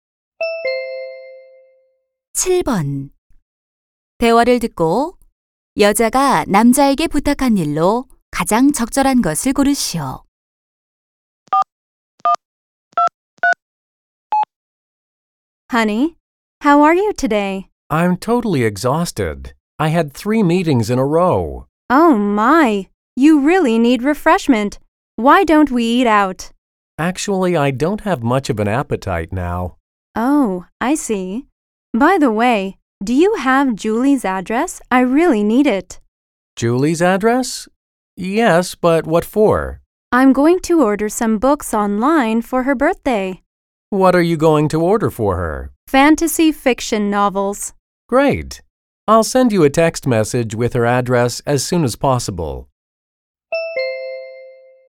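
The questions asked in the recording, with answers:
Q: 대화를 듣고 여자가 남자에게 부탁한 일로 가장 적절한 것을 고르시오.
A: Julie의 주소 알려 주기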